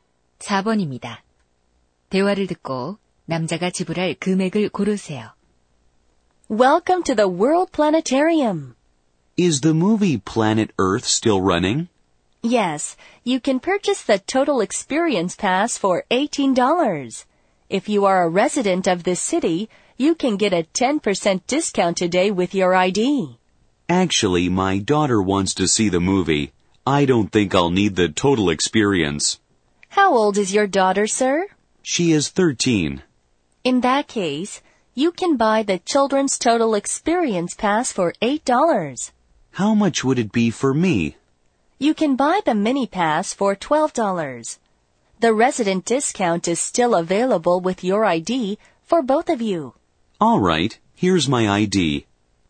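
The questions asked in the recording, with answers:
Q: 대화를 듣고 남자가 지불할 금액을 고르세요.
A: 18달러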